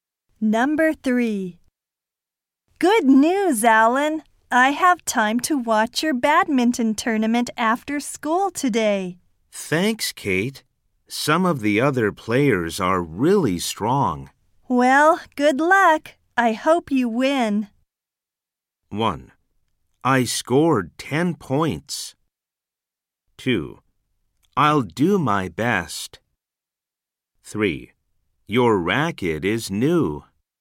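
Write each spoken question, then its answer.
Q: Well, good luck. I hope you win.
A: 2: I'll do my best.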